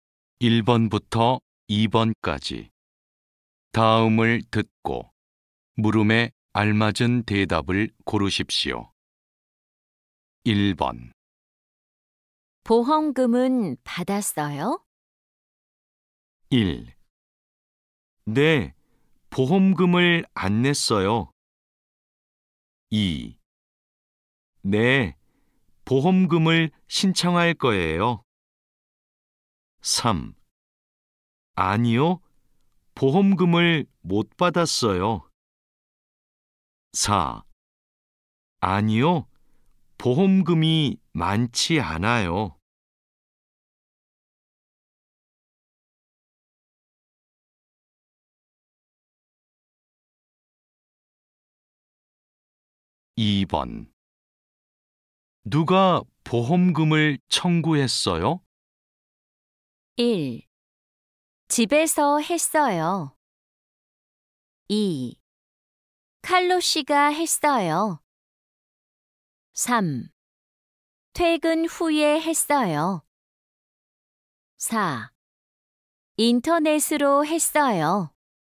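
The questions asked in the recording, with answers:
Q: 보험금은 받았어요?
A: 3: 아니요, 보험금을 못 받았어요.

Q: 누가 보험금을 청구했어요?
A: 2: 칼로 씨가 했어요.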